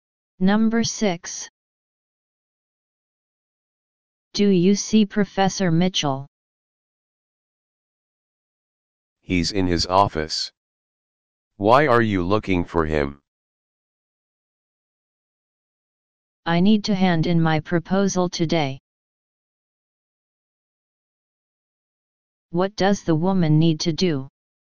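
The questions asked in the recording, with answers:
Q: What does the woman need to do?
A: Hand in her proposal today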